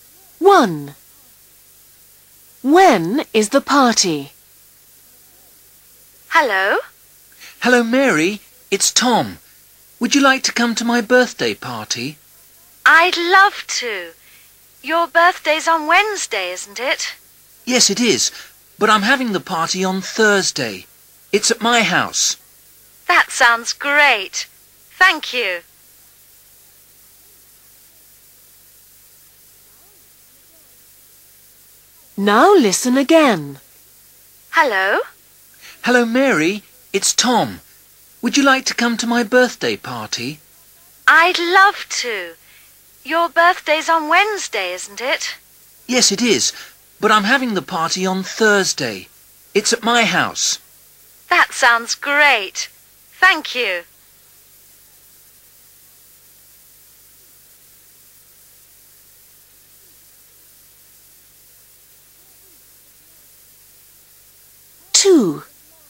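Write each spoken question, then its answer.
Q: When is the party?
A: On Thursday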